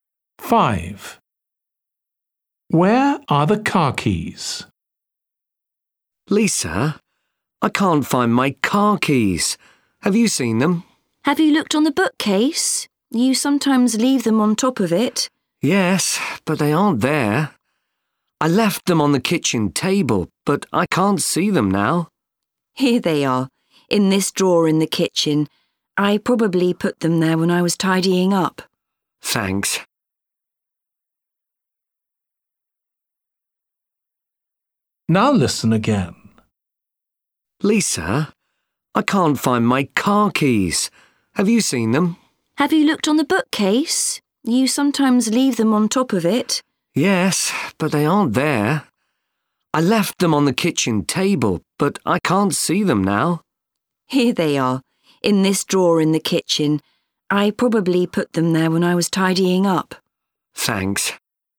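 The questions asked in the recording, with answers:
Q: Where are the car keys?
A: In a drawer in the kitchen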